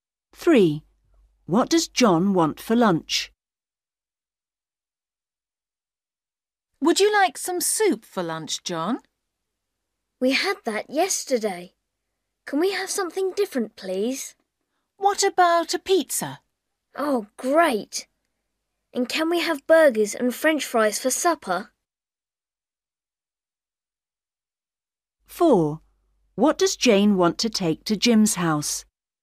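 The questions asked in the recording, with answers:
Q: What does John want for lunch?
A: Pizza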